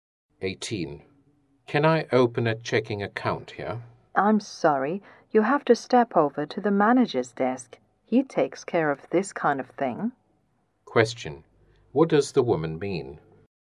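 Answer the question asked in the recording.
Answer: The man must go to the manager's desk to open the account.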